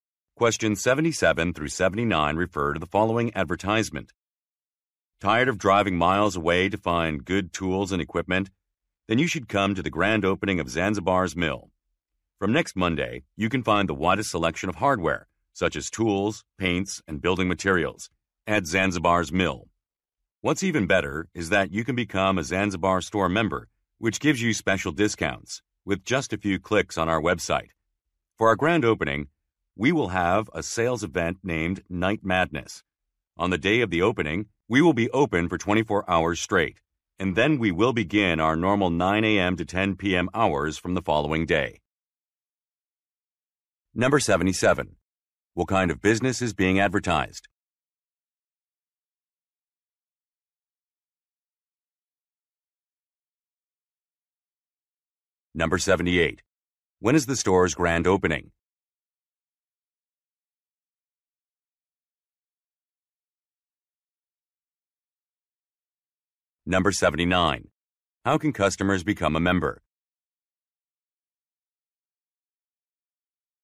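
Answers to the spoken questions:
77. A hardware store
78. Next Monday
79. By signing up on the website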